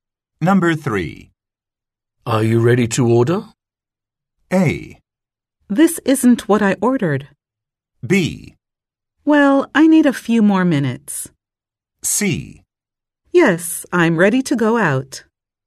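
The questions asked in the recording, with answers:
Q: Are you ready to order?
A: B: Well, I need a few more minutes.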